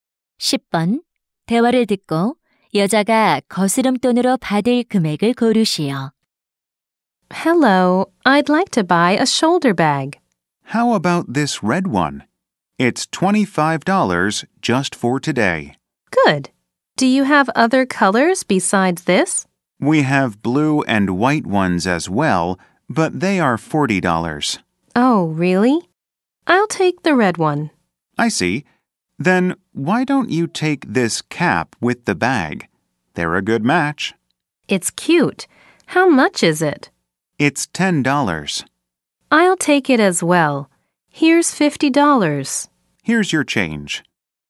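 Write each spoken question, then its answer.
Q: 대화를 듣고 여자가 거스름돈으로 받을 금액을 고르시오.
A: 15달러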